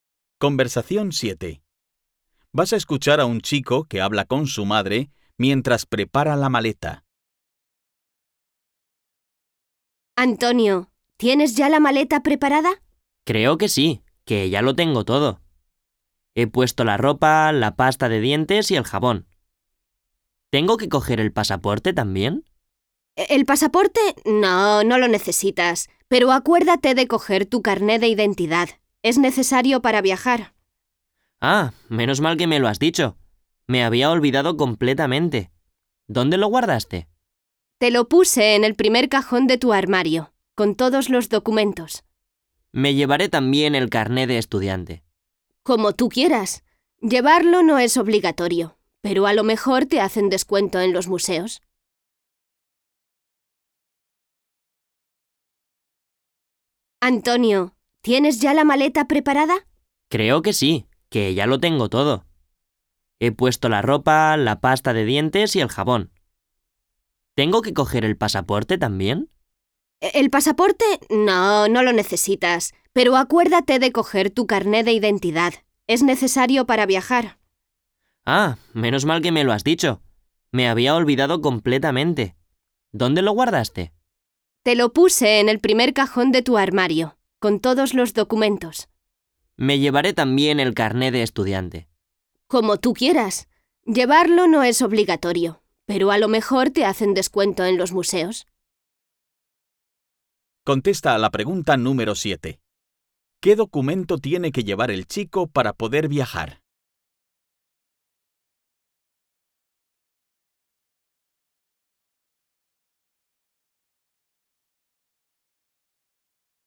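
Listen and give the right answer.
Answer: El carné de identidad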